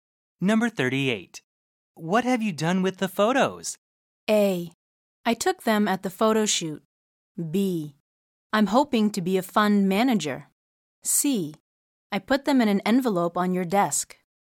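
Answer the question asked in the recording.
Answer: C: I put them in an envelope on your desk.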